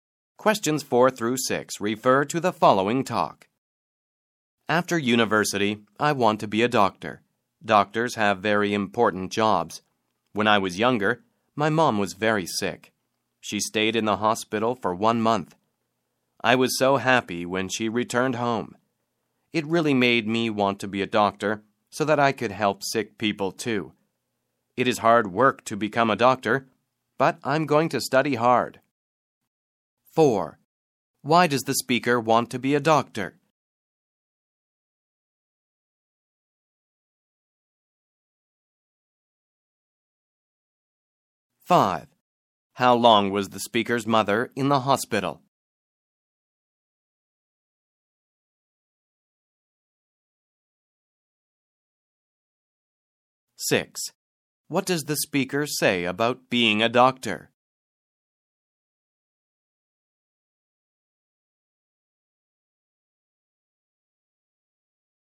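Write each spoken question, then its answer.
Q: Why does the speaker want to be a doctor?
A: To help sick people, because his mother was sick

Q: How long was the speaker's mother in the hospital?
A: One month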